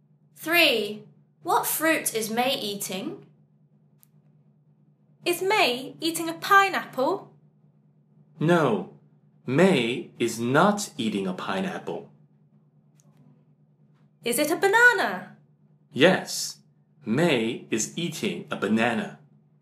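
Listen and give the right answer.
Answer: a banana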